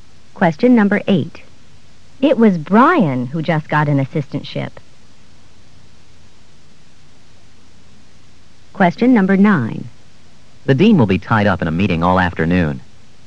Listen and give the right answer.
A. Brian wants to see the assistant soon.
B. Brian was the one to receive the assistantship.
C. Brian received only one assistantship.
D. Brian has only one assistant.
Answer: B. Brian was the one to receive the assistantship.

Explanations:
It was Brian who just got an assistantship.